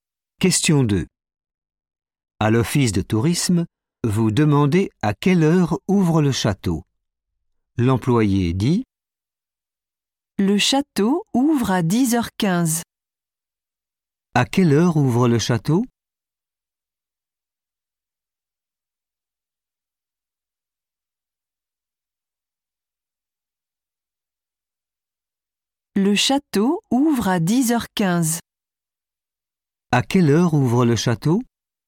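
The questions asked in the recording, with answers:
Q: À quelle heure ouvre le château?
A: à 10h15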